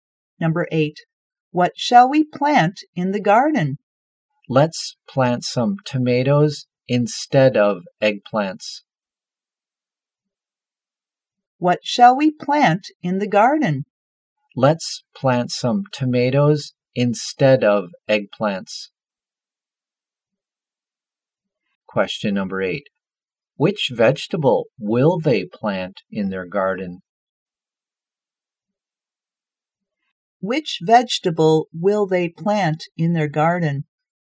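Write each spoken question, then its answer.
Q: Which vegetable will they plant in their garden?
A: Tomatoes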